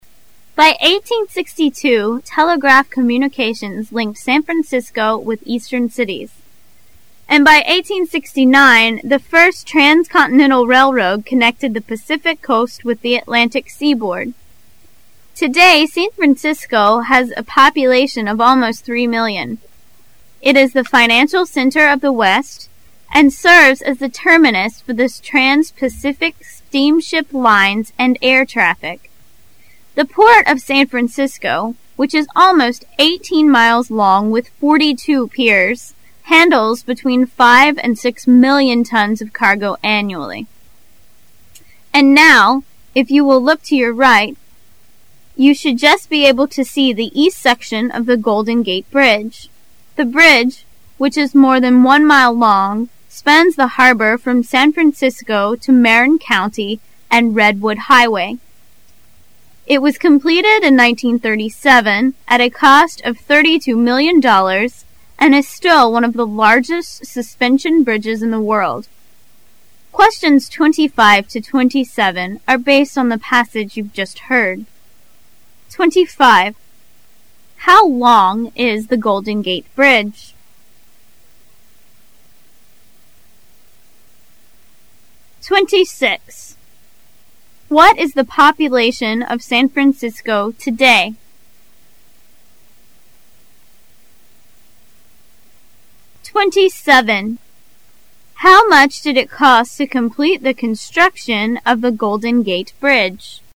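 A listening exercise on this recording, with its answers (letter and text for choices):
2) What is the population of San Francisco today?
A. 2 million.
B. 3 million.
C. 5 million.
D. 6 million.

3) How much did it cost to complete construction of the Golden Gate Bridge?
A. $19 million.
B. $32 million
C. $37 million.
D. $42 million.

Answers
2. B. 3 million.
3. B. $32 million

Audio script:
[解析] 25-27 By 1862 telegraph communications linked San Francisco with eastern cities, and by 1869, the first transcontinental railroad connected the Pacific coast with the Atlantic seaboard. Today San Francisco has a population of almost three million. It is the financial center of the West, and serves as the terminus for trans-Pacific steamship lines and air traffic. The port of San Francisco, which is almost eighteen miles long with forty-two piers, handles between five and six million tons of cargo annually. 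And now, if you will look to your right, you should just be able to see the east section of the Golden Gate Bridge. The bridge, which is more than one mile long, spans the harbor from San Francisco to Marin County and the Red Wood Highway. It was completed in 1937 at a cost of thirty-two million dollars and is still one of the largest suspension bridges in the world. Questions 25 to 27 are based on the passage you've just heard: 25. How long is the Golden Gate Bridge?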